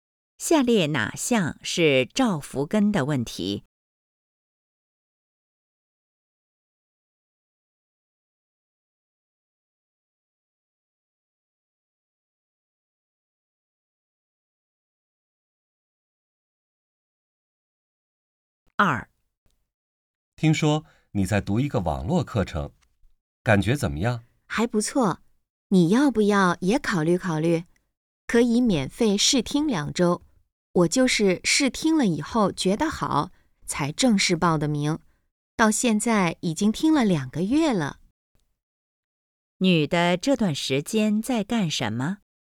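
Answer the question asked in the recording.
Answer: 在读一个网络课程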